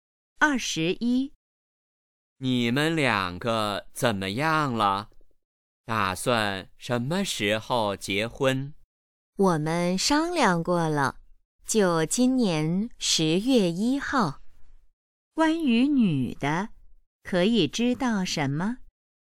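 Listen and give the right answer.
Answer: 今年10月1号结婚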